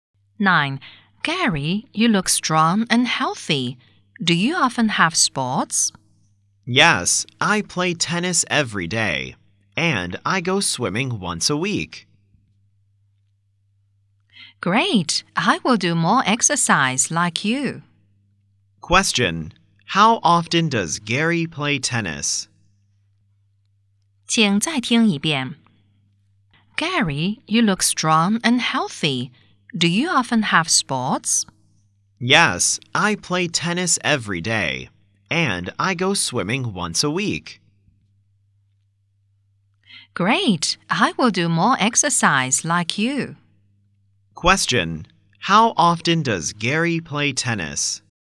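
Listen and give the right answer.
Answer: Every day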